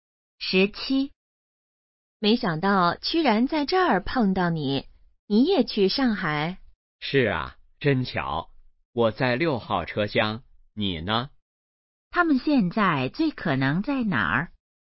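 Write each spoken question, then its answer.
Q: 他们现在最可能在哪儿?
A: 火车上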